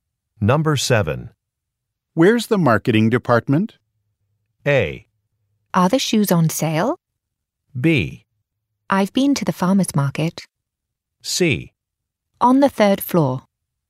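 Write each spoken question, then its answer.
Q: Where's the marketing department?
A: C: On the third floor.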